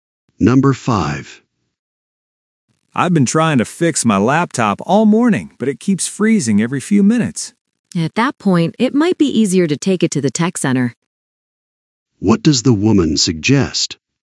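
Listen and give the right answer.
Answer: Taking the laptop to the tech center.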